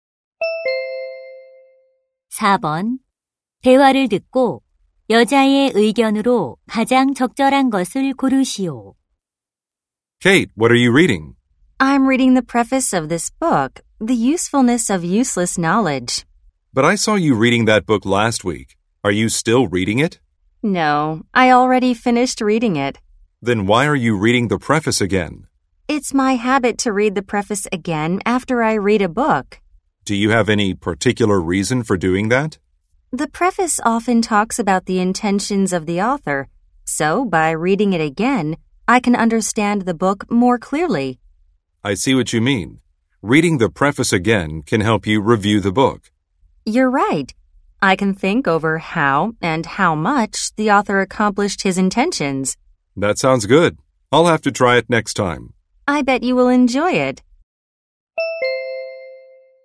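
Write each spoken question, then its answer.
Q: 대화를 듣고 여자의 의견으로 가장 적절한 것을 고르시오.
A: 책을 읽은 후 서문을 다시 읽으면 책을 더 잘 이해할 수 있다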